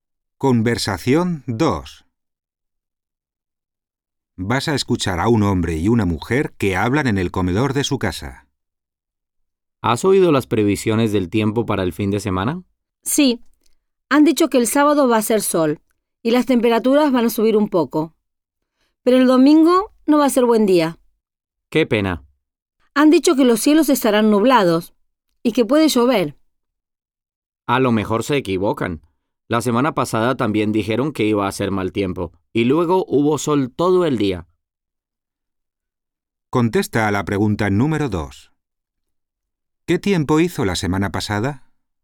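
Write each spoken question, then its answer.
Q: ¿Qué tiempo hizo la semana pasada?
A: Hizo sol todo el día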